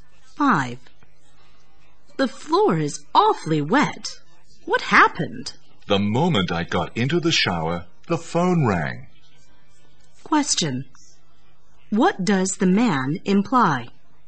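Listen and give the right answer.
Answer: He got out of the shower, still wet, to answer the phone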